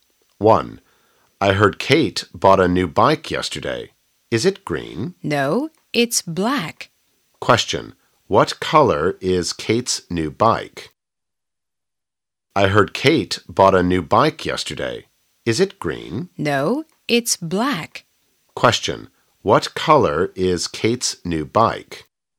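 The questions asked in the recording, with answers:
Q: What color is Kate's new bike?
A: Black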